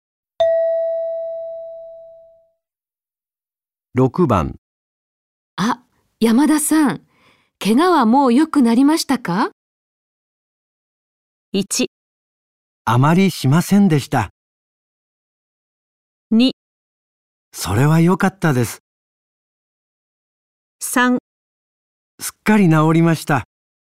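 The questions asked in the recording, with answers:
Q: あ、山田さん、怪我はもう良くなりましたか?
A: 3: すっかり治りました。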